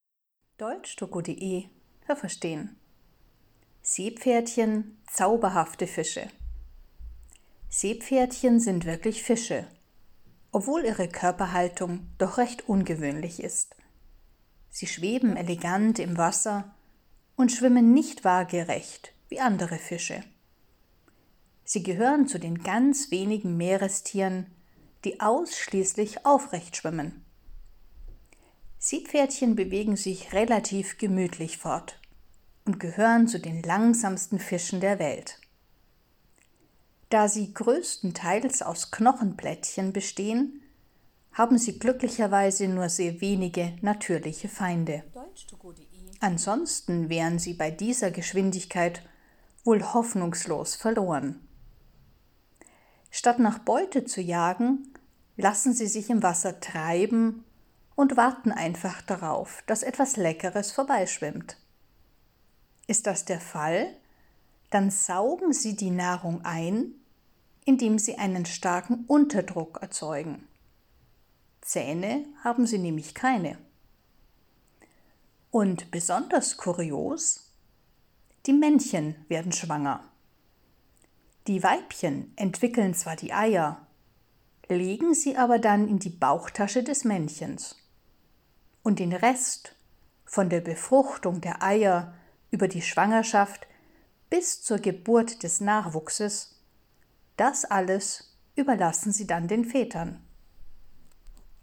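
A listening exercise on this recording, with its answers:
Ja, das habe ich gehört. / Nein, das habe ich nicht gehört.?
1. Seepferdchen schwimmen senkrecht, andere Fische waagrecht.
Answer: Ja, das habe ich gehört.

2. Seepferdchen bewegen sich langsam, deshalb leben sie gefährlich und haben viele Feinde.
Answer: Nein, das habe ich nicht gehört.

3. Sie haben wenige natürliche Feinde, weil sie größtenteils aus Knochenplättchen bestehen.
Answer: Ja, das habe ich gehört.

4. Seepferdchen suchen aktiv nach Nahrung.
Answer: Nein, das habe ich nicht gehört.

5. Sie saugen die Nahrung mit ihren Zähnen ein.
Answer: Nein, das habe ich nicht gehört.

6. Die Weibchen legen die Eier in die Bauchtasche des Männchens.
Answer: Ja, das habe ich gehört.

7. Bei den Seepferdchen werden Männchen und Weibchen schwanger.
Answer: Nein, das habe ich nicht gehört.

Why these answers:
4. Sie sind nicht aktiv, sondern warten, bis etwas Passendes vorbeikommt.

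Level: B2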